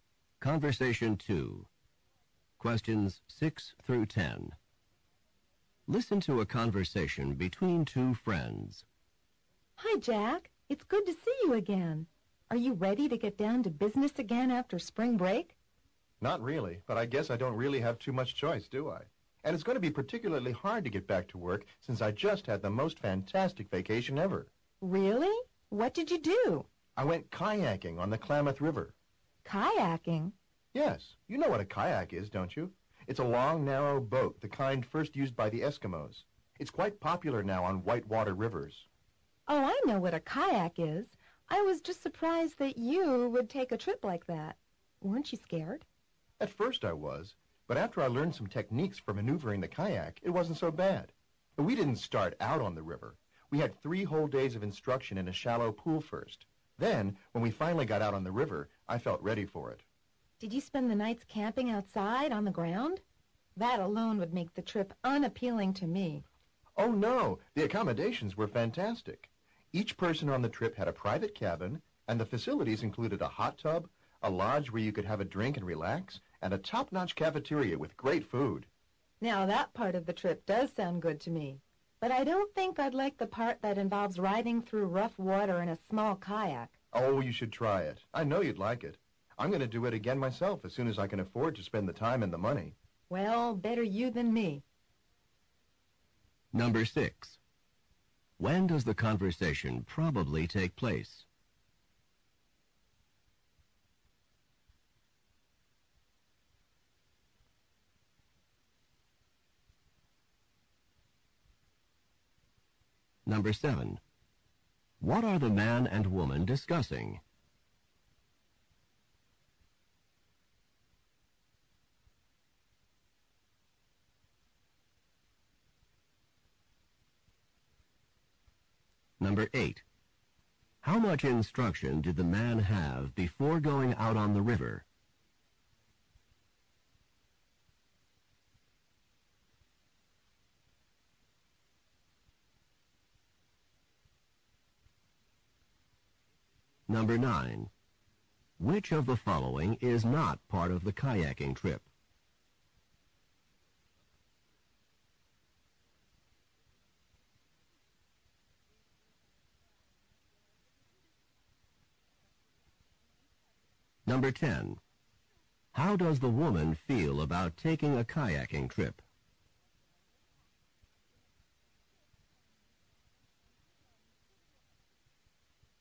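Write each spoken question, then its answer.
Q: When does the conversation probably take place?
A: Just after spring break

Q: What are the man and woman discussing?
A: The man's kayaking trip on the Klamath River

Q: How much instruction did the man have before going out on the river?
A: Three days

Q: Which of the following is not part of the kayaking trip?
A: Camping outside on the ground

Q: How does the woman feel about taking a kayaking trip?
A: She doesn't want to take one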